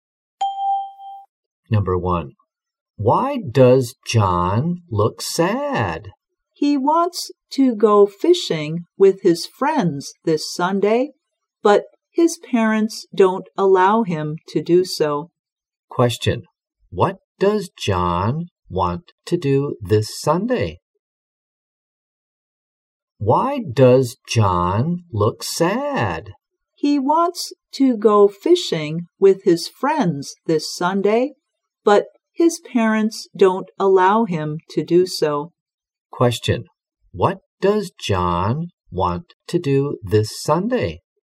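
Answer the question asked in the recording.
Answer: Go fishing with his friends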